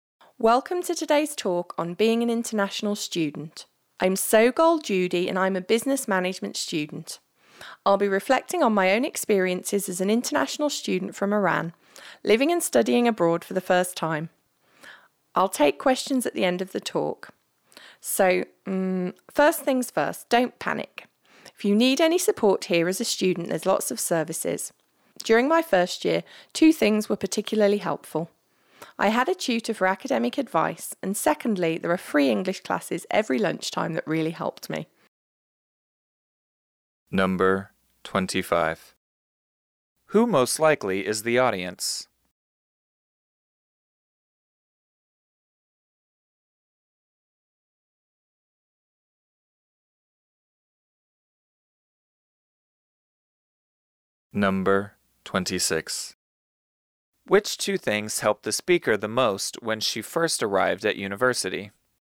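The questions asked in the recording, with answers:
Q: Which two things helped the speaker the most when she first arrived at university?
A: An academic tutor and free lunchtime English classes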